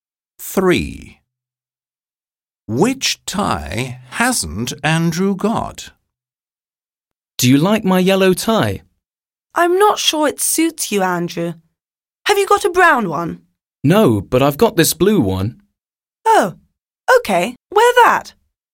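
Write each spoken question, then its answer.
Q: Which tie hasn't Andrew got?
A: A brown tie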